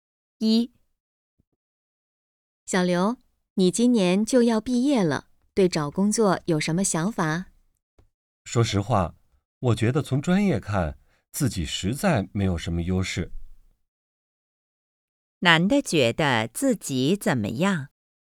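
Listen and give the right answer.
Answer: 从专业看没有什么优势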